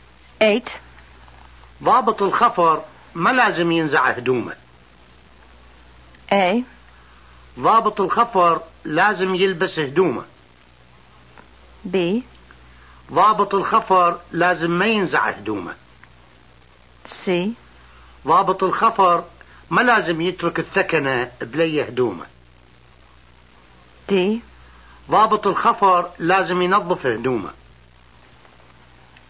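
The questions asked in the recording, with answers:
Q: ضابط الخفر ما لازم ينزع هدومه.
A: B: ضابط الخفر لازم ما ينزع هدومه.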